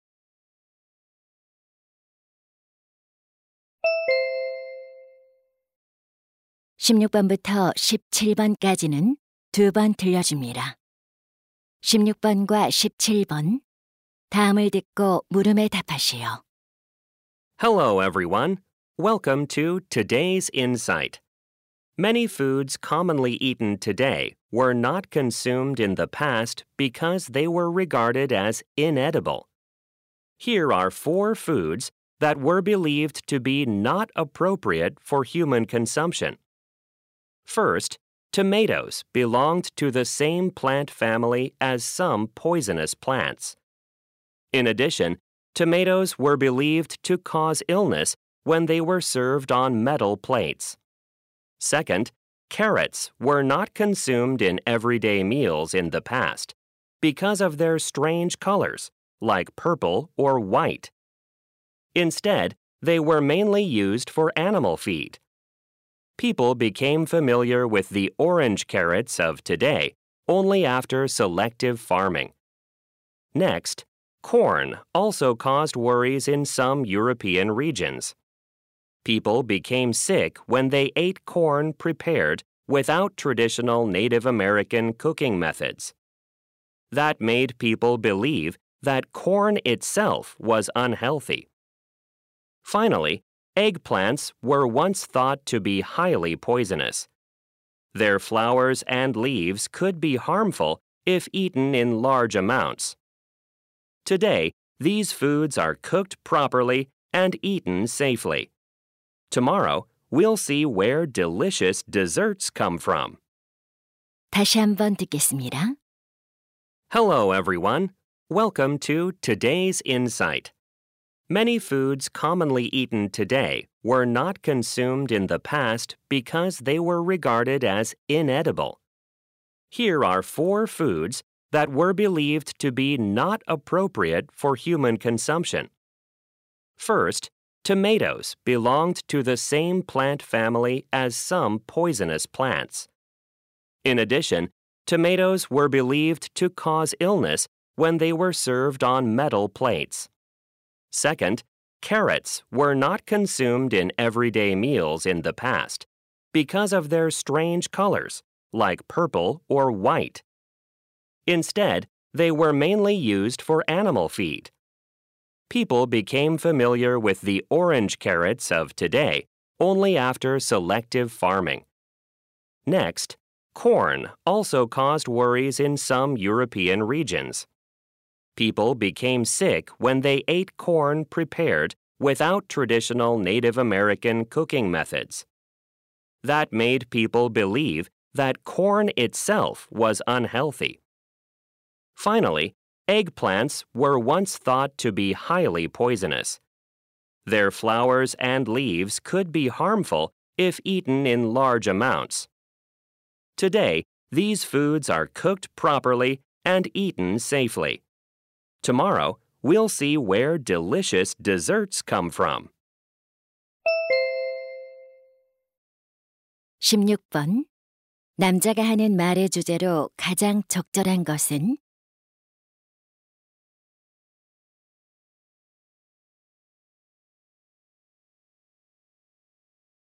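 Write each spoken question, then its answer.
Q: 남자가 하는 말의 주제로 가장 적절한 것은?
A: 과거에 먹을 수 없다고 여겨졌던 음식들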